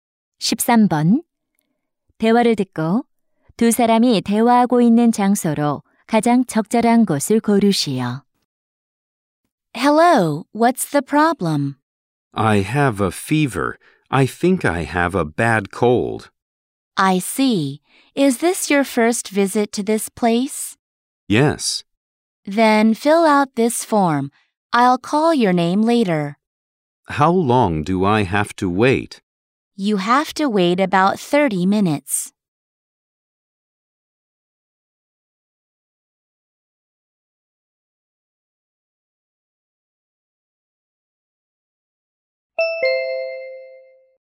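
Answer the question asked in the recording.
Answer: 병원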